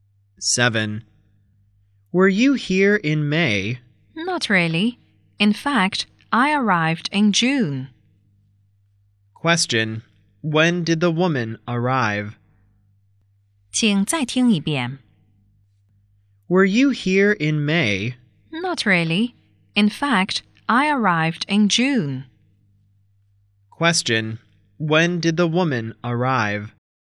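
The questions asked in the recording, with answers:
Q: When did the woman arrive?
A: In June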